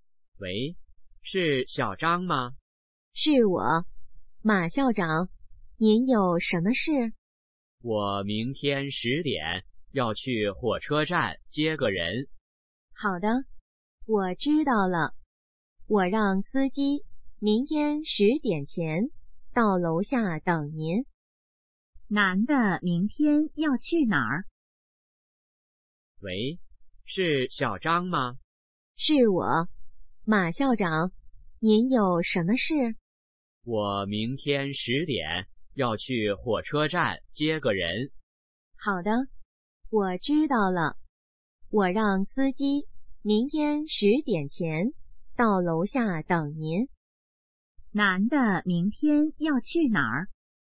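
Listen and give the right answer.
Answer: 火车站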